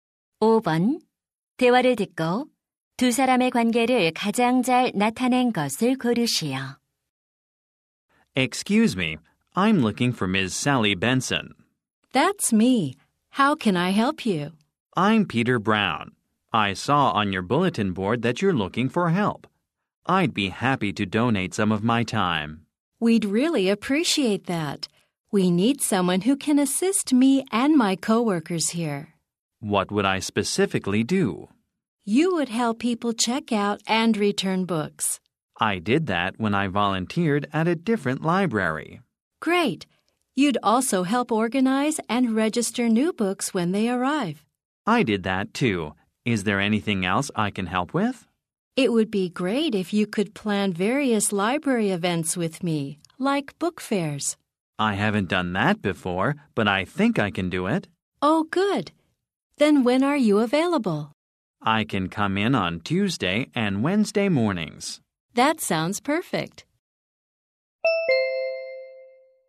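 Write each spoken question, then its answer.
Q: 대화를 듣고 두 사람의 관계를 가장 잘 나타낸 것을 고르시오.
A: 도서관 사서 - 자원봉사 지원자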